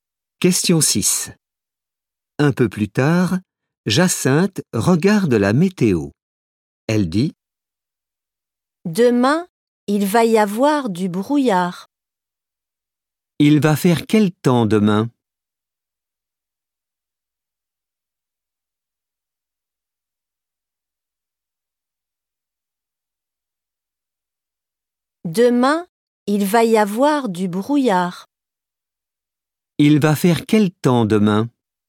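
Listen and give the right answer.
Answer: du brouillard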